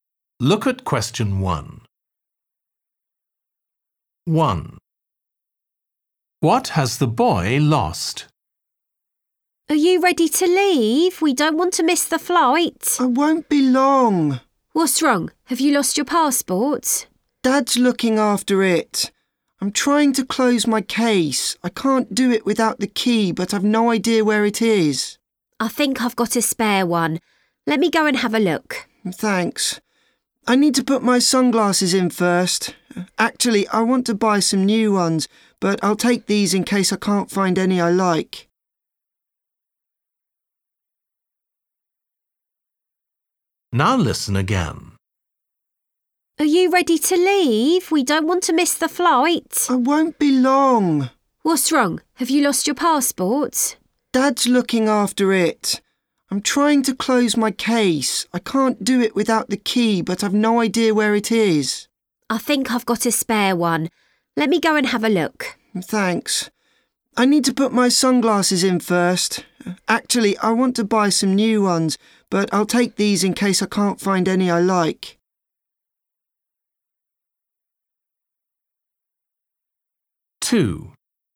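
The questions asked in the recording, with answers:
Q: What has the boy lost?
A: the key to his case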